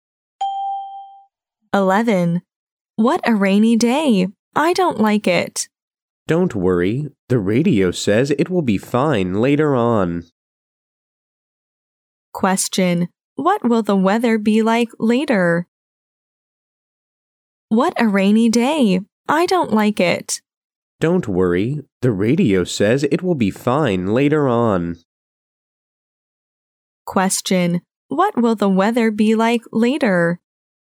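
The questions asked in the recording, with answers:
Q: What will the weather be like later?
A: Fine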